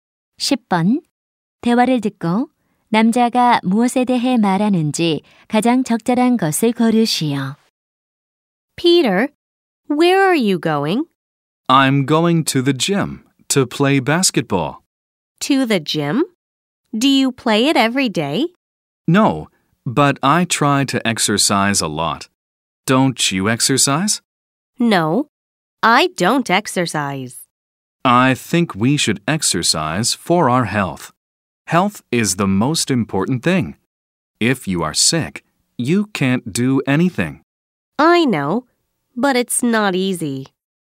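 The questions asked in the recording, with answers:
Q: 대화를 듣고 남자가 무엇에 대해 말하는지 가장 적절한 것을 고르시오.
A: 건강을 위한 운동의 중요성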